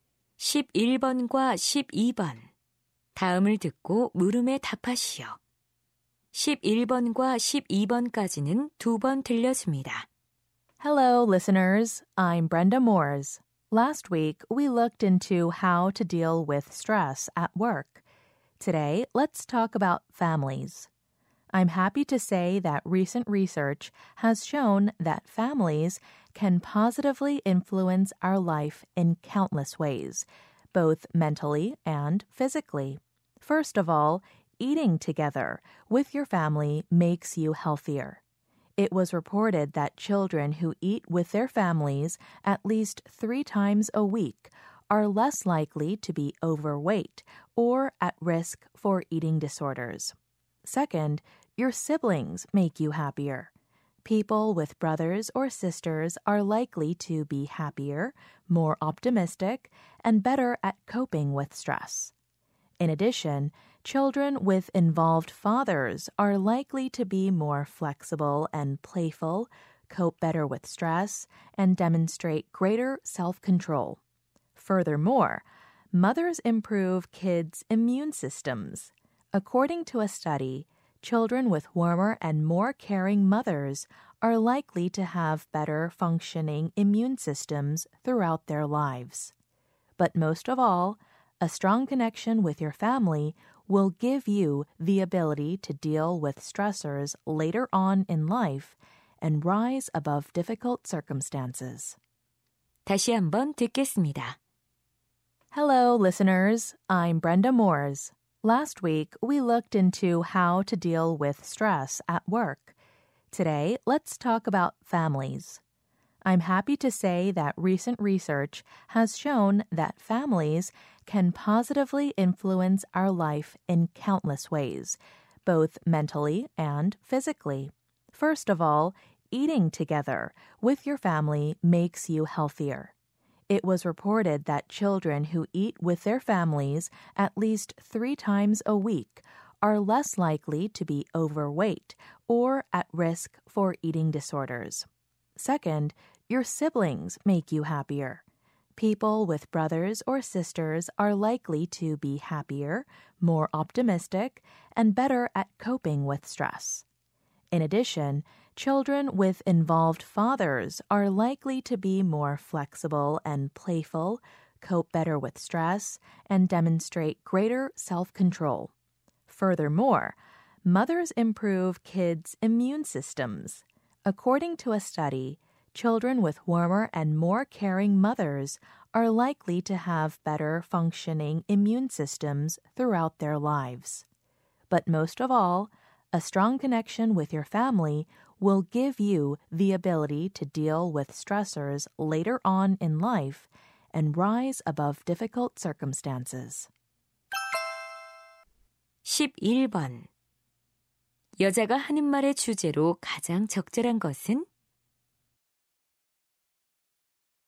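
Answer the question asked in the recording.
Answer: 가족이 삶에 미치는 긍정적 영향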